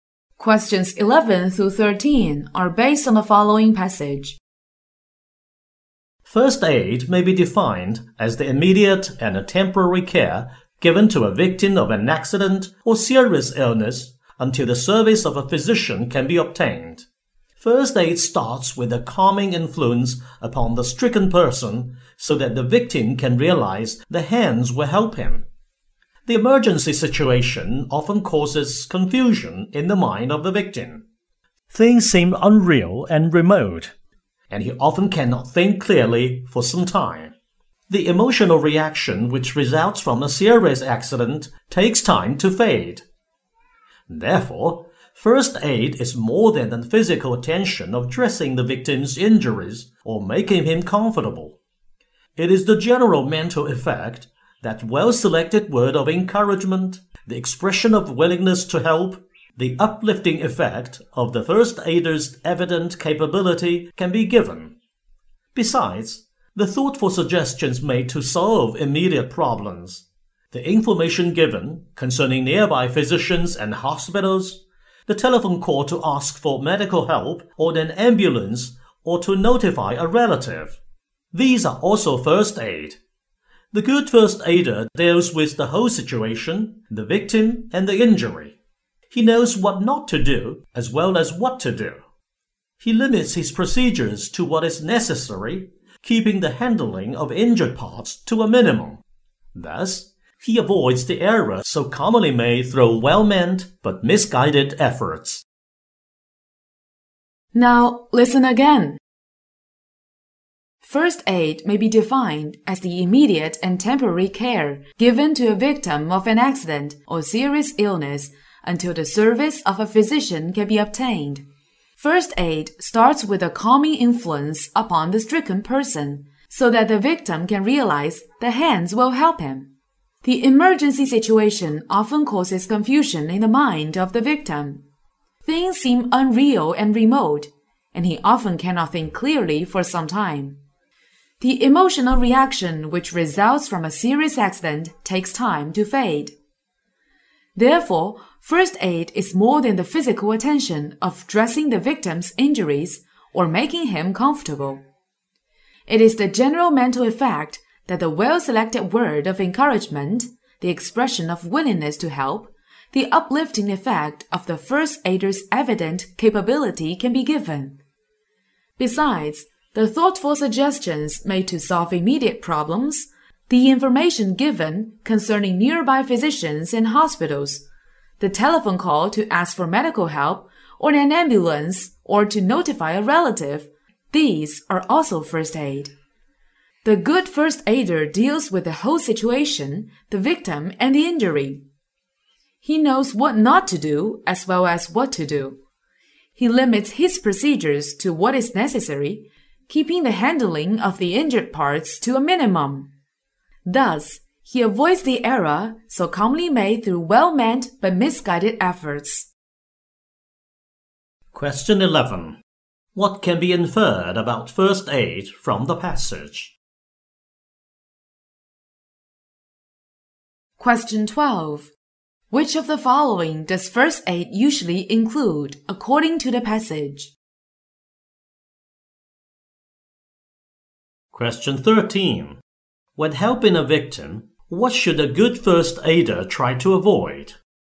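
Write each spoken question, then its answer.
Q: When helping a victim, what should a good first aider try to avoid?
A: Misguided efforts and handling the injured parts more than needed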